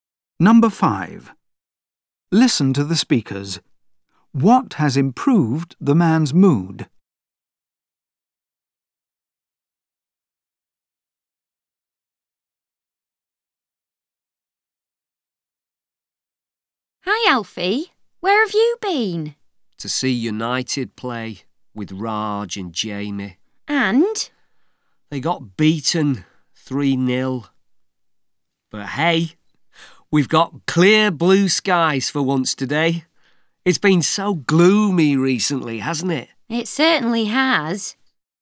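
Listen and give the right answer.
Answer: The clear blue sky (the good weather)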